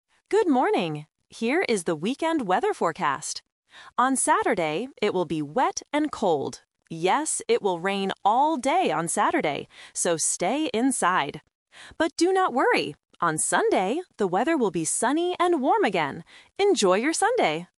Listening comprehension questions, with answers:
Listen to the weather forecast. Choose the correct answer (A, B, or C) for each question.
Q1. What is the weather like on Saturday?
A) Sunny and warm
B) Wet and cold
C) Windy and cold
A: Wet and cold

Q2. What day will be sunny?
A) Friday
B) Saturday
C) Sunday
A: Sunday

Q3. What does the announcer tell people to do on Saturday?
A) Stay inside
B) Go outside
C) Buy an umbrella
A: Stay inside

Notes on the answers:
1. The announcer clearly states, "On Saturday, it will be wet and cold." Option (A) is a trap because "sunny and warm" is the weather for Sunday. Option (C) is plausible for bad weather, but "windy" is not mentioned.
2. The announcer says, "On Sunday, the weather will be sunny and warm again." Option (B) is a trap because Saturday is mentioned, but it will be raining. Option (A) is not mentioned at all.
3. Because of the rain on Saturday, the announcer says, "So, stay inside!" Option (B) is the opposite of what is said (the trap). Option (C) makes sense for a rainy day, but the speaker never says it.

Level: A1

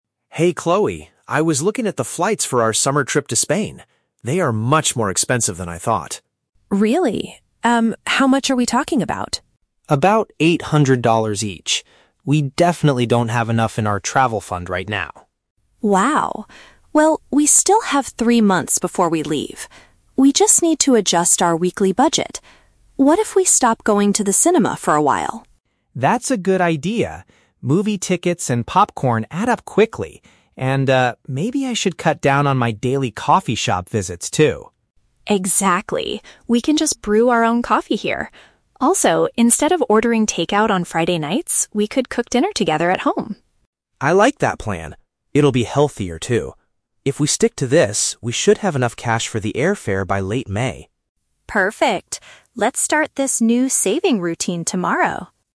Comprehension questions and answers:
Listen to a conversation between two friends and choose the correct answer (A, B, or C) for each question.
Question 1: Why is Ryan concerned at the beginning of the conversation?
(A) The plane tickets cost a lot more than he expected.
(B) Their summer hotel reservation was unexpectedly canceled.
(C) He lost his credit card at a local coffee shop.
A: The plane tickets cost a lot more than he expected.

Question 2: What is one of the specific expenses the couple decides to reduce?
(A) Purchasing groceries from the supermarket.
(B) Going out to watch films at the theater.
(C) Buying expensive clothes for the upcoming trip.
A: Going out to watch films at the theater.

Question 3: When do they expect to reach their financial goal for the flights?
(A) In exactly three weeks from today.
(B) Sometime during the latter part of May.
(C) Tomorrow morning before they go to work.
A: Sometime during the latter part of May.

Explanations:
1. Ryan says the flights to Spain are "much more expensive than I thought." Option (A) is a direct paraphrase of this statement. Why the trap is wrong: Option (C) is a trap. The audio mentions a "coffee shop" later in the conversation, but Ryan talks about cutting down on visits to save money, not losing his credit card. Option (B) is a plausible travel issue, but hotels are not mentioned.
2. Chloe suggests, "What if we stop going to the cinema for a while?" "Going to the cinema" is a synonym for watching films at the theater. Why the trap is wrong: Option (A) is a trap. They mention cooking dinner together at home instead of ordering takeout, which means they will continue or increase purchasing groceries, not reduce them. Option (C) is plausible for trip preparation, but clothing is never mentioned.
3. Ryan states that they should have enough cash for the airfare "by late May." "The latter part of May" is a paraphrase for late May. Why the trap is wrong: Option (A) is a trap. Chloe mentions they have "three months" before they leave, not three weeks. Option (C) is also a trap. Chloe says, "Let's start this new saving routine tomorrow," meaning the plan starts tomorrow, not that they will reach the goal tomorrow.

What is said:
Ryan: Hey Chloe, I was looking at the flights for our summer trip to Spain. They are much more expensive than I thought.
Chloe: Really? Um, how much are we talking about?
We definitely don't have enough in our travel fund right now.
Chloe: Wow. Well, we still have three months before we leave. We just need to adjust our weekly budget. What if we stop going to the cinema for a while?
Ryan: That's a good idea. Movie tickets and popcorn add up quickly. And, ah, maybe I should cut down on my daily coffee shop visits, too.
Chloe: Exactly. We can just brew our own coffee here. Also, instead of ordering takeout on Friday nights, we could cook dinner together at home.
Ryan: I like that plan. It'll be healthier, too. If we stick to this, we should have enough cash for the airfare by late May.

